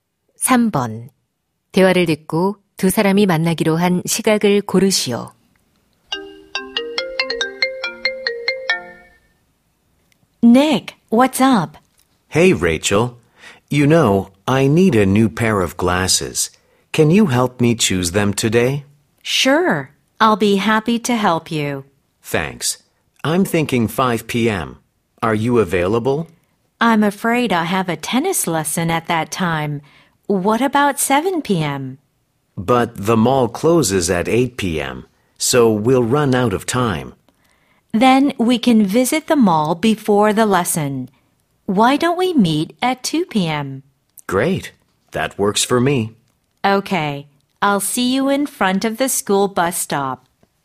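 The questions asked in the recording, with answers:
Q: 대화를 듣고 두 사람이 만나기로 한 시각을 고르시오.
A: 오후 2시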